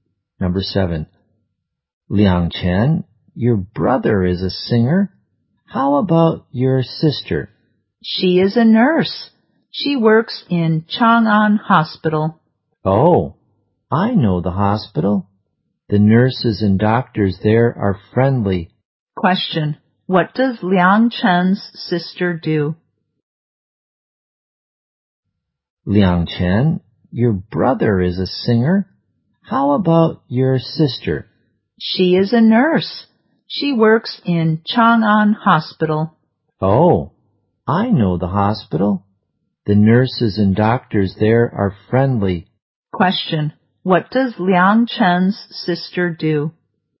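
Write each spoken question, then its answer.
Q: What does Liang Chen's sister do?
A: She is a nurse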